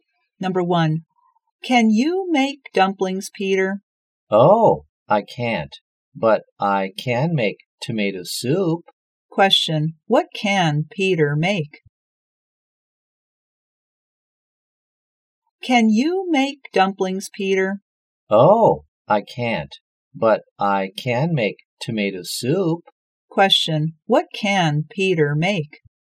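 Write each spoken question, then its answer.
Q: what can Peter make?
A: Tomato soup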